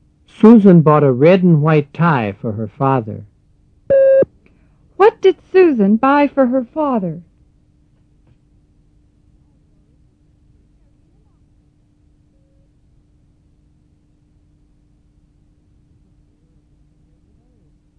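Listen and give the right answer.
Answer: A red and white tie.

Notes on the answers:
Susan bought a red and white tie for her father.

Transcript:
Susan bought a red and white tie for her father. What did Susan buy for her father?

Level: 入门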